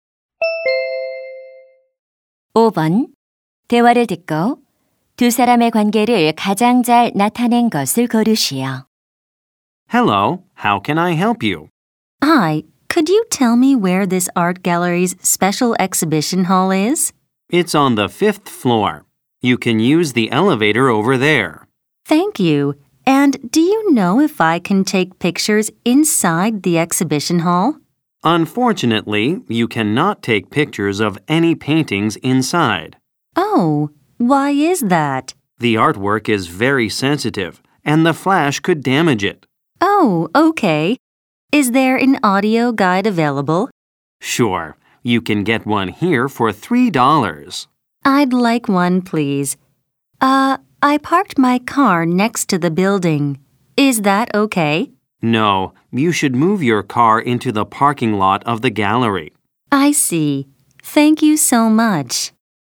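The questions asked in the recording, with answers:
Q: 대화를 듣고 두 사람의 관계를 가장 잘 나타낸 것을 고르시오.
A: 미술관 직원 - 관람객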